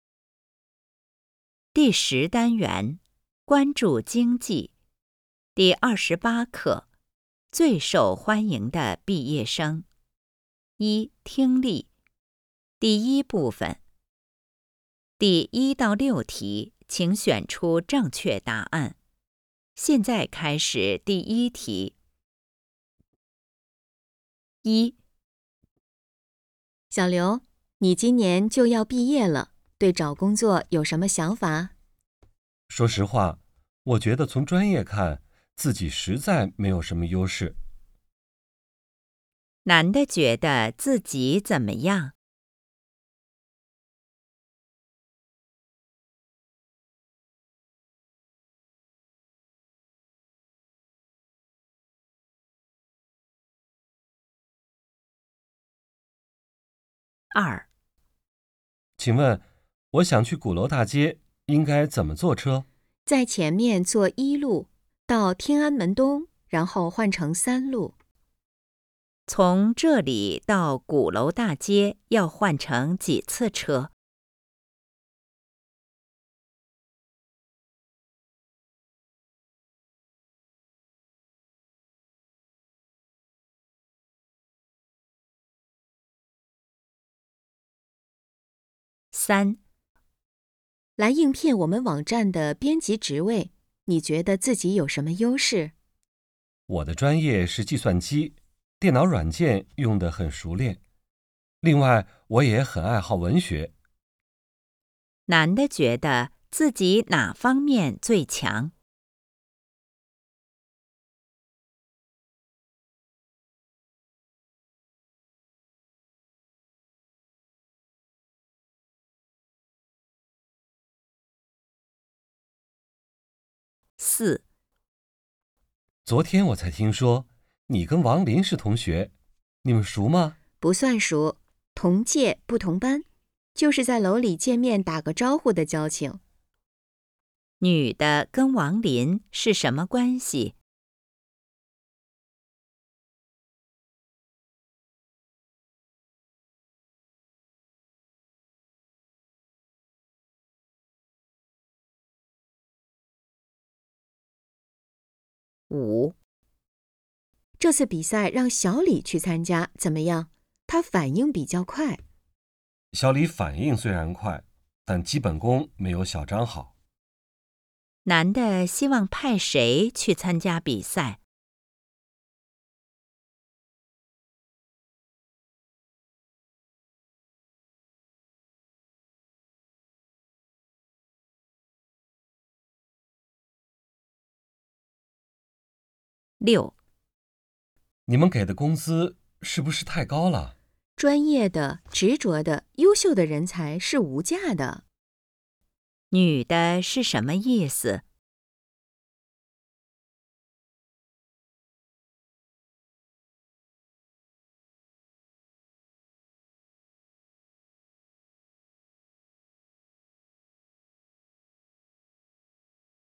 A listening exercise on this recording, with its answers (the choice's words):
第1-6题:请选择正确答案。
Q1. 男的觉得自己怎么样?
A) 毕不了业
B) 专业很好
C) 能找到好工作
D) 就业形势不乐观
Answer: 就业形势不乐观

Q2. 从这里到鼓楼大街要换乘几次车?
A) 1次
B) 2次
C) 3次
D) 4次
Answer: 1次

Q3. 男的觉得自己哪方面最强?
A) 上网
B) 编辑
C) 电脑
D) 文学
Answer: 电脑

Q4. 女的跟王林是什么关系?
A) 同班同学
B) 同年级同学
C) 师兄妹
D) 情人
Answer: 同年级同学

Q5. 男的希望派谁去参加比赛?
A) 小张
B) 小李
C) 两个都可以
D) 两个都不行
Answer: 小张

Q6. 女的是什么意思?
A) 给的工资太高了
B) 学这个专业的人少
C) 为人才付钱是值得的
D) 她可以为公司挣回来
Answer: 为人才付钱是值得的

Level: HSK 5